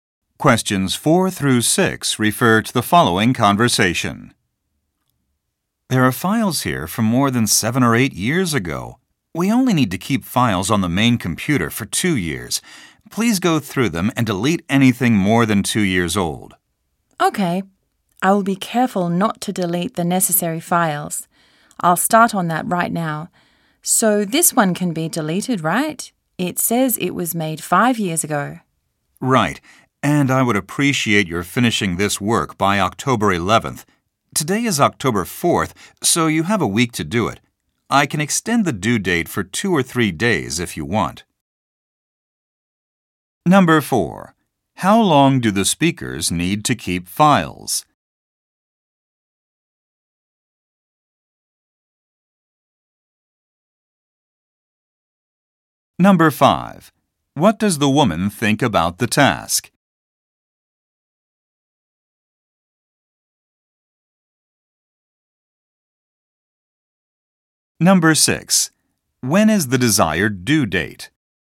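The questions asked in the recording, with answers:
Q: How long do the speakers need to keep files?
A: 2 years

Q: When is the desired due date?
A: October 11th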